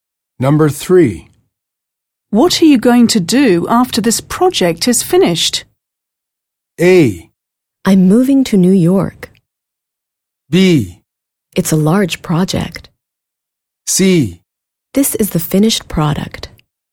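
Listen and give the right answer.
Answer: A: I'm moving to New York.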